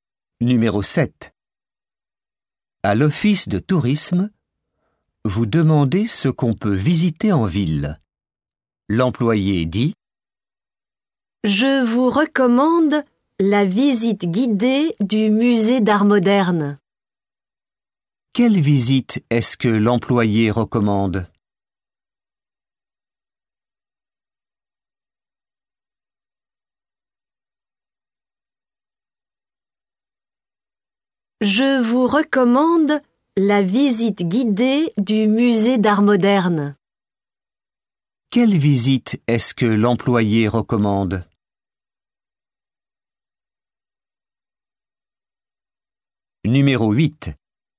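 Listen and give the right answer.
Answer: la visite guidée du musée d'art moderne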